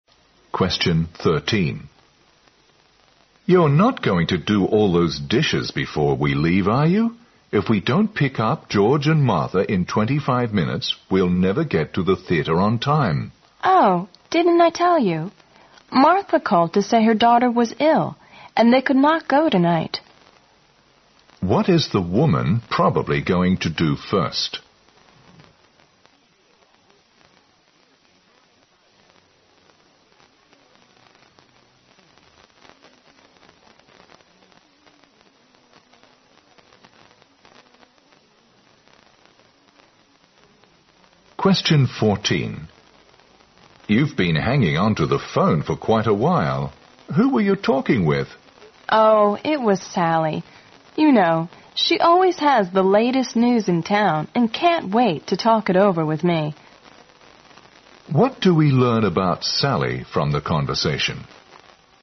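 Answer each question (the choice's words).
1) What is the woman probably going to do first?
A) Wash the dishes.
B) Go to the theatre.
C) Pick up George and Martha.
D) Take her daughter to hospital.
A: Wash the dishes.

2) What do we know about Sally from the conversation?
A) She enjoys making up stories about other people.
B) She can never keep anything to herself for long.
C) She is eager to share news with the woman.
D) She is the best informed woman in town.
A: She is eager to share news with the woman.

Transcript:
M: You are not going to do all those dishes before we leave, are you? If we don't pick up George and Martha in 25 minutes, we'll never get to the theater on time.
W: Oh, didn't I tell you? Martha called to say her daughter was ill and they could not go tonight.
Q: What is the woman probably going to do first?
M: You've been hanging onto the phone for quite a while. Who were you talking with?
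W: Oh, it was Sally. You know she always has the latest news in town and can't wait to talk it over with me.
Q: What do we know about Sally from the conversation?

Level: 六级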